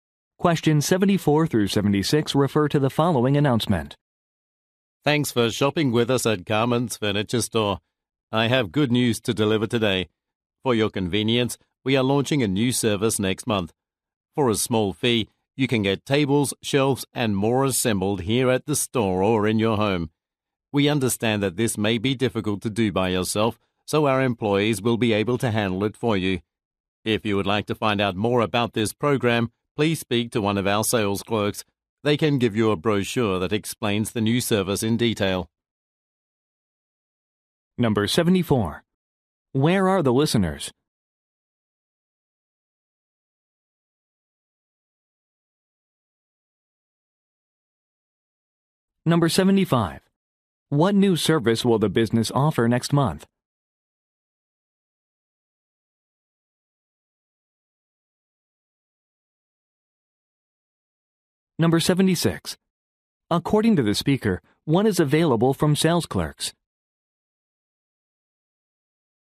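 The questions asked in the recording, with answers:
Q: Where are the listeners?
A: At a furniture store

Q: What new service will the business offer next month?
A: Furniture assembly

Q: According to the speaker, what is available from sales clerks?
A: A brochure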